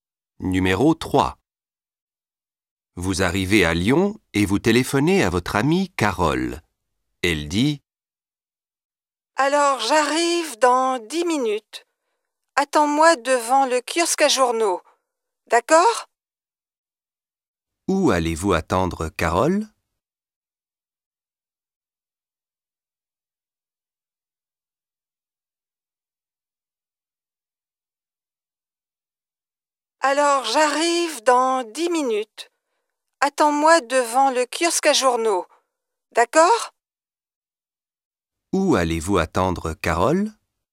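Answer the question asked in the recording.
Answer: Devant le kiosque à journaux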